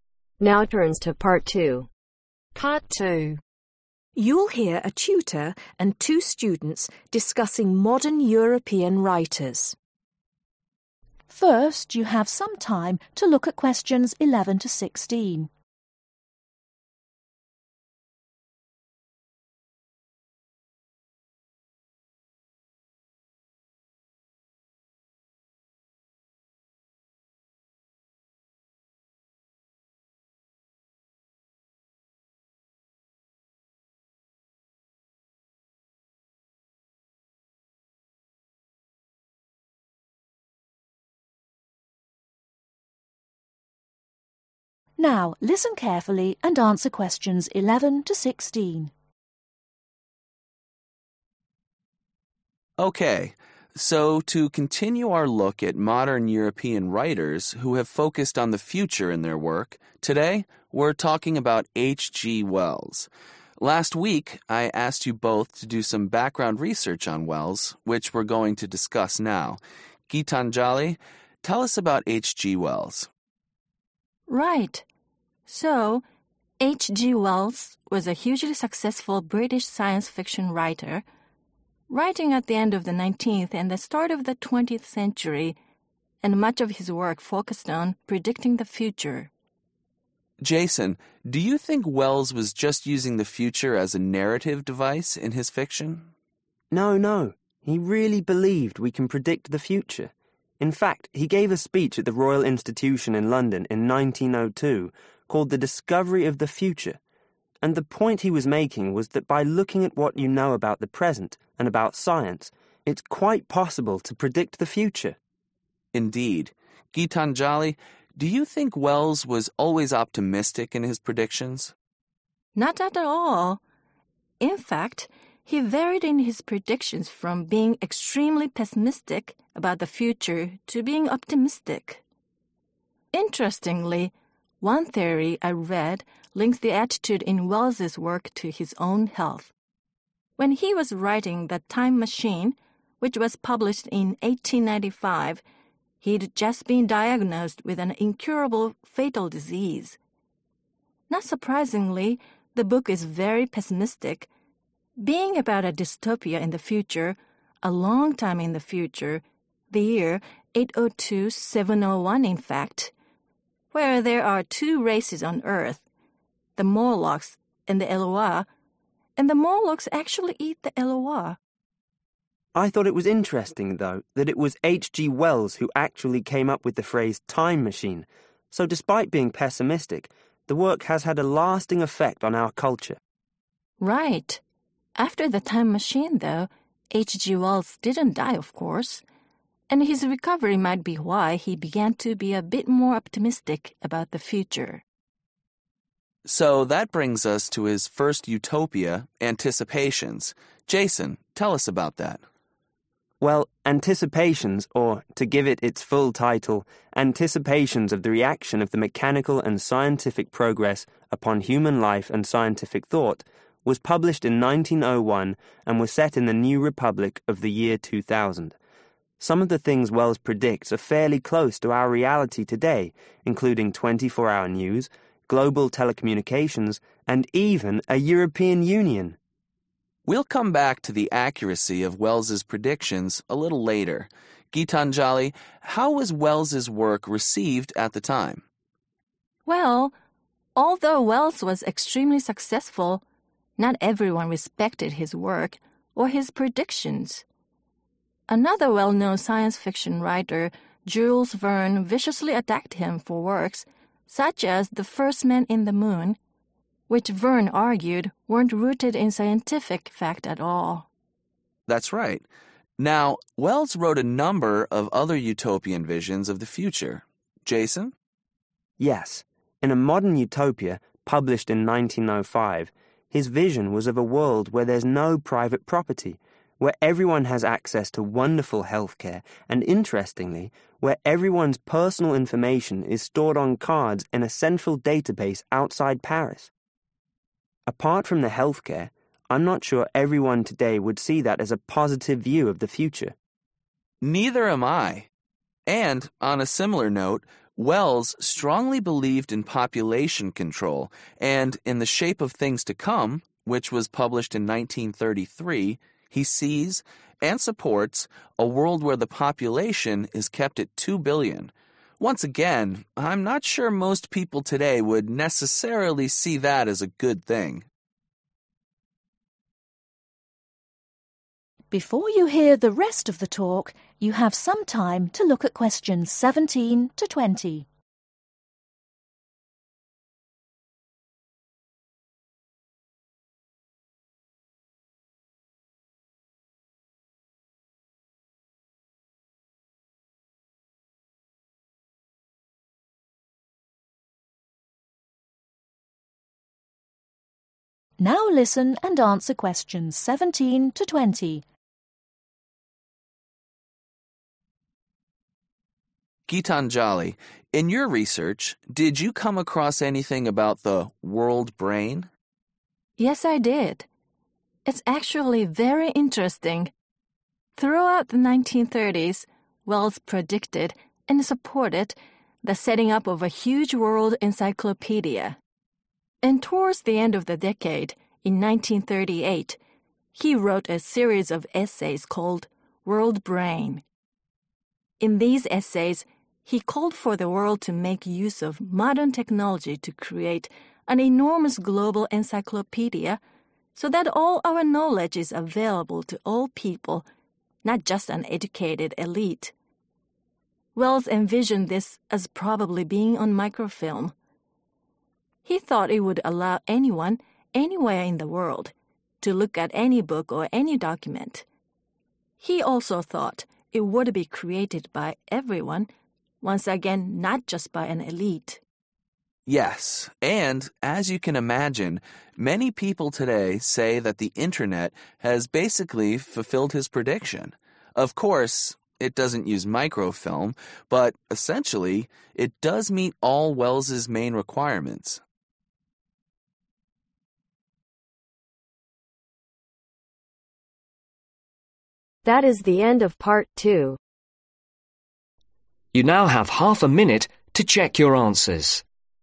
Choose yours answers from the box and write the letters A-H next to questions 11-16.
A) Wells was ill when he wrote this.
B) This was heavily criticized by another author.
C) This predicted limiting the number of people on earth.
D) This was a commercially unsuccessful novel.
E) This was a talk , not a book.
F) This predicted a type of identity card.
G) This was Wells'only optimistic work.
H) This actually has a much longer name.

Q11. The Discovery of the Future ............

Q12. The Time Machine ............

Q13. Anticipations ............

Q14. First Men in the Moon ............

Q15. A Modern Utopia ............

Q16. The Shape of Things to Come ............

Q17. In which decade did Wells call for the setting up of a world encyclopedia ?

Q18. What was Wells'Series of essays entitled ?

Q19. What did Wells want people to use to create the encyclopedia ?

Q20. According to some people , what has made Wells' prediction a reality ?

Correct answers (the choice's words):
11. This was a talk , not a book.
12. Wells was ill when he wrote this.
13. This actually has a much longer name.
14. This was heavily criticized by another author.
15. This predicted a type of identity card.
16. This predicted limiting the number of people on earth.
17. (the) 1930s / 1930
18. world Brain
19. modern technology
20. the internet / internet